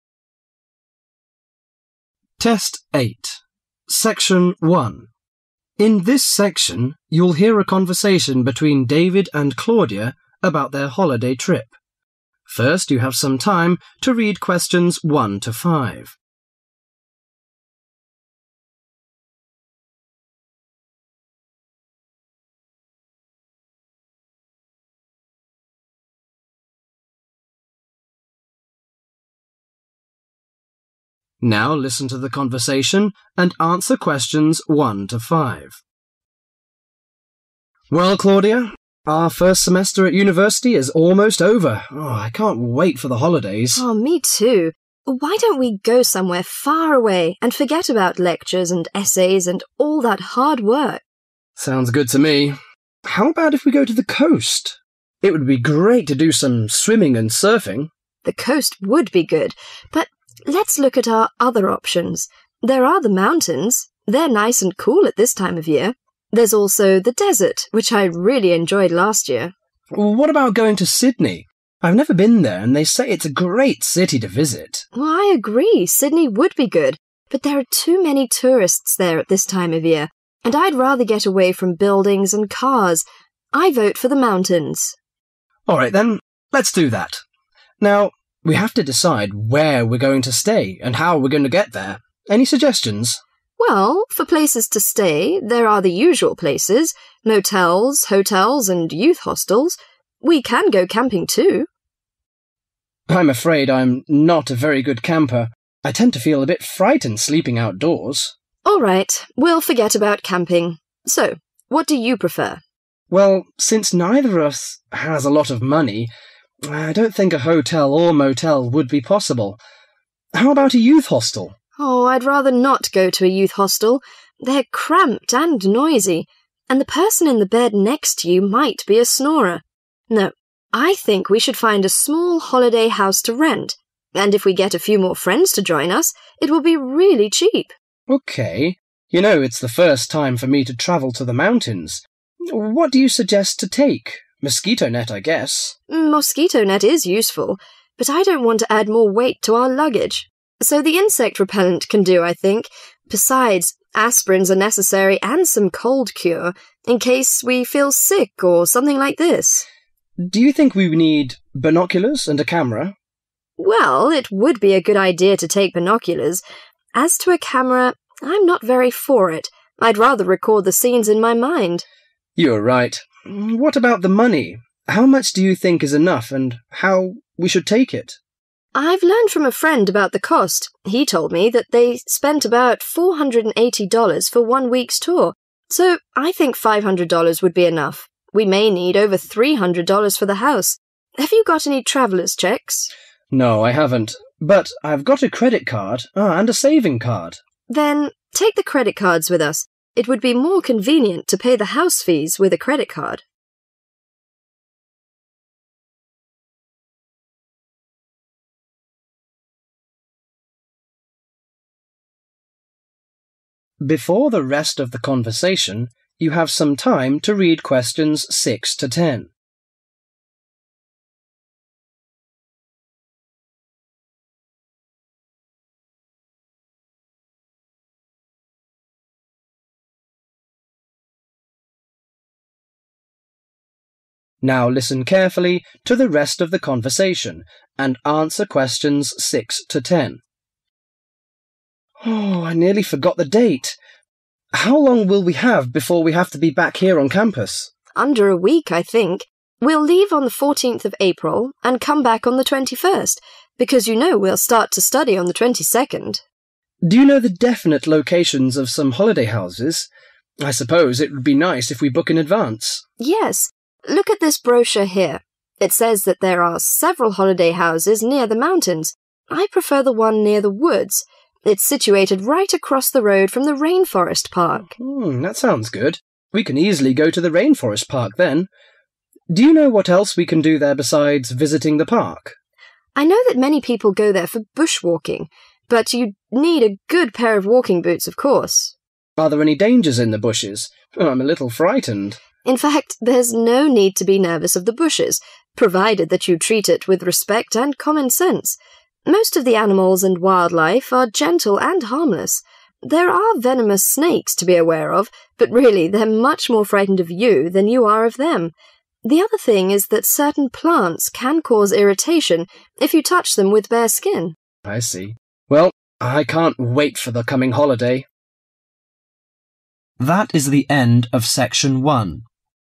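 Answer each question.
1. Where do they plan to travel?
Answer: The mountains.

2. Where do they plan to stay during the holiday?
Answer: A holiday house.

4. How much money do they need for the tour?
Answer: $ 500.

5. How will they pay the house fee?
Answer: With the credit card.

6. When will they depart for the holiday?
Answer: 14th of April

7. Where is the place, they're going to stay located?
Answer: across from rainforest park

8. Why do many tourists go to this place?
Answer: bushwalking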